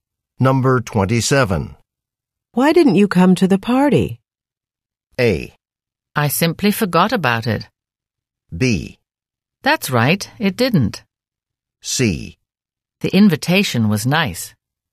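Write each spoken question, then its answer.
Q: Why didn't you come to the party?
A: A: I simply forgot about it.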